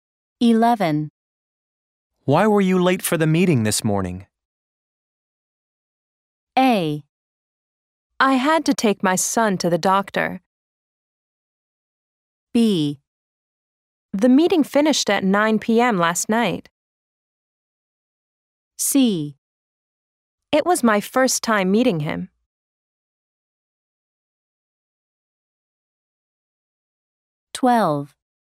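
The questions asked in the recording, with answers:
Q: Why were you late for the meeting this morning?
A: A: I had to take my son to the doctor.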